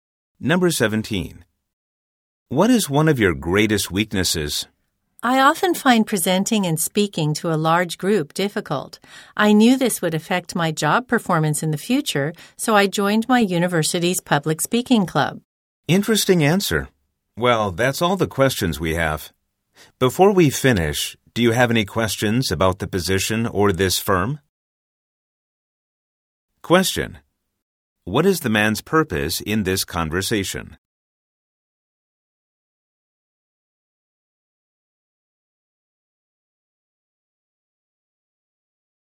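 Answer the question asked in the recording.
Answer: To get a job (job interview)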